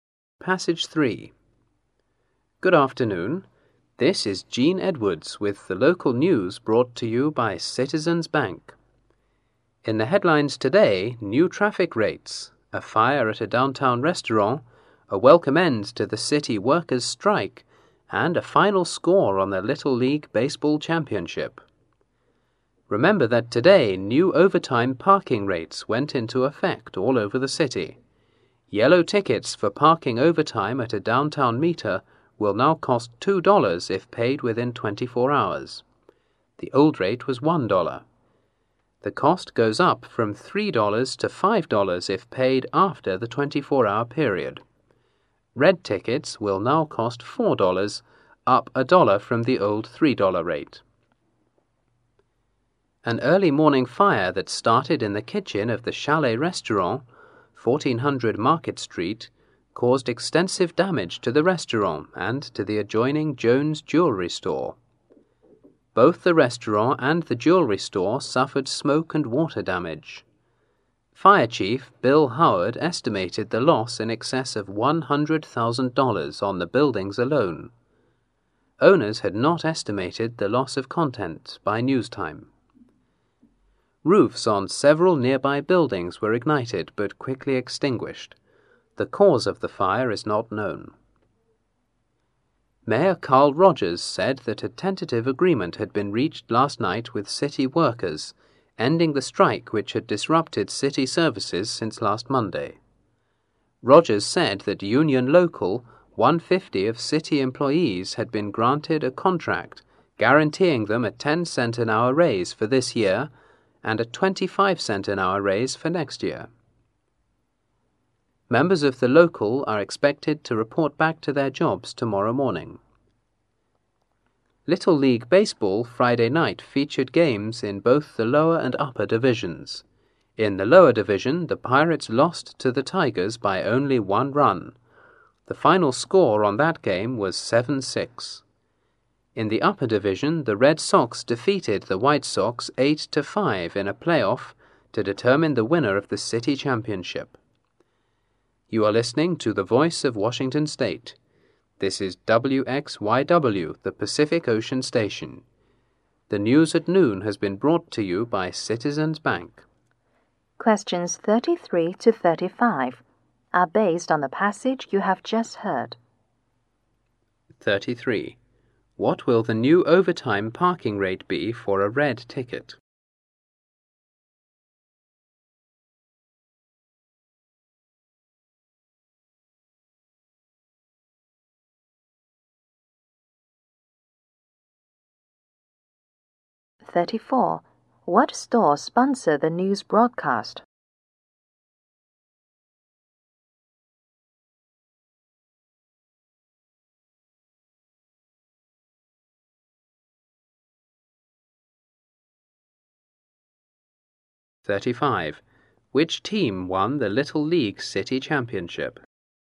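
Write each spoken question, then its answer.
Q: What store sponsor the news broadcast?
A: Citizens Bank.

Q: Which team won the Little League City Championship?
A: The Red Sox.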